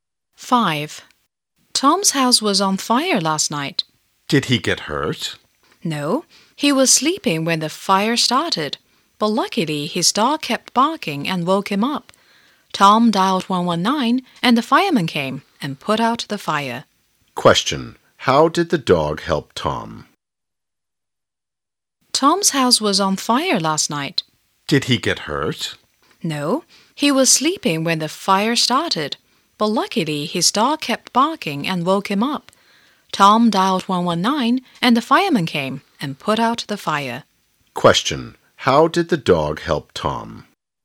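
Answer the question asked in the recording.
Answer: It kept barking and woke him up.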